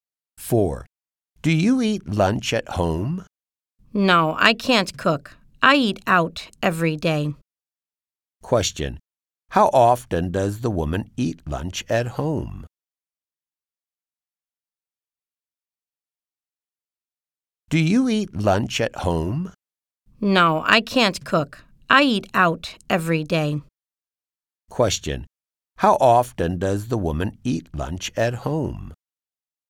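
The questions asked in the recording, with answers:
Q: How often does the woman eat lunch at home?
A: Never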